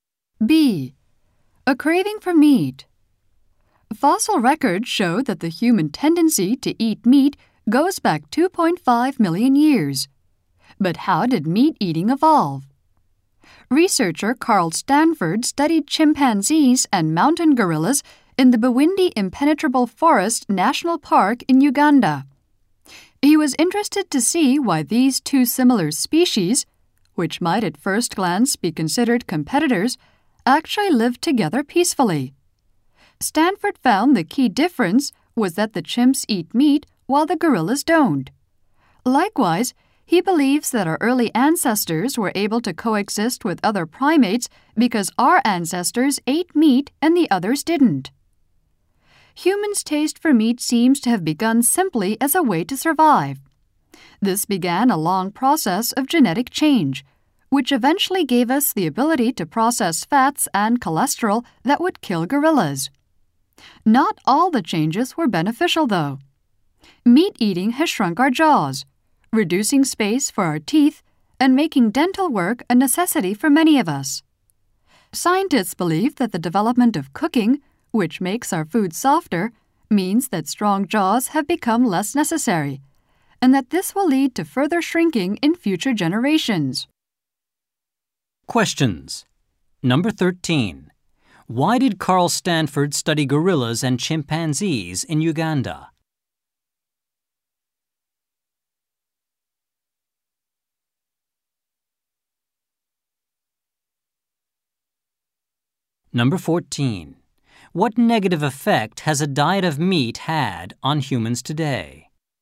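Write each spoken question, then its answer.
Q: Why did Carl Stanford study gorillas and chimpanzees in Uganda?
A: To see why the two similar species lived together peacefully

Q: What negative effect has a diet of meat had on humans today?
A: It has shrunk our jaws, so many people need dental work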